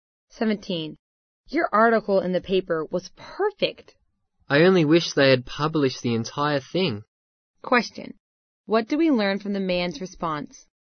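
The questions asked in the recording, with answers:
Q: What do we learn from the man's response?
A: Only part of his article was published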